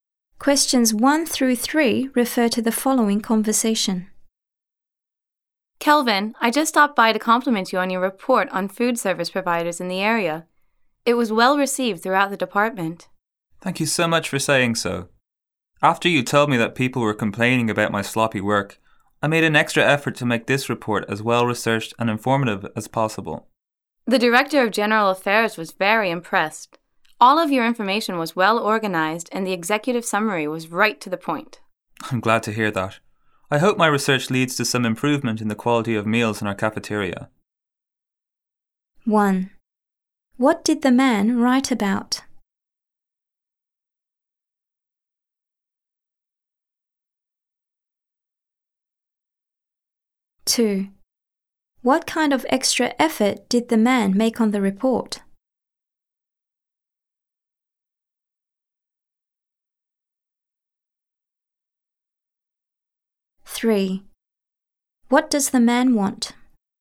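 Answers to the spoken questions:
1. Food service providers in the area
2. He made it as well researched and informative as possible
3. Better quality meals in the cafeteria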